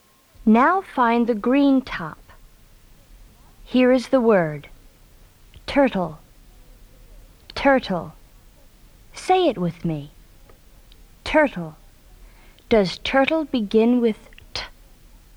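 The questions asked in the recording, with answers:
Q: Does turtle begin with T?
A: Yes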